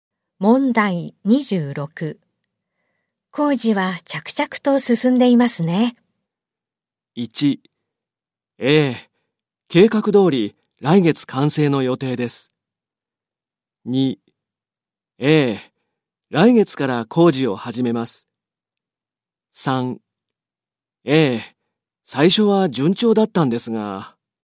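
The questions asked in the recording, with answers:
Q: 工事は着々と進んでいますね。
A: 1: ええ、計画通り来月完成の予定です。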